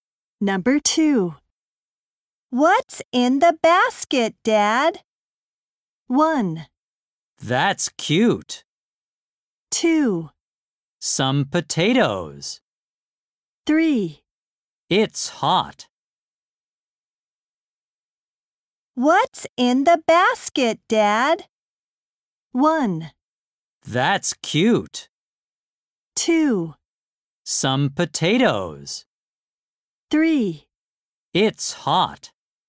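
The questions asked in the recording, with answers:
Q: What's in the basket, Dad?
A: 2: Some potatoes.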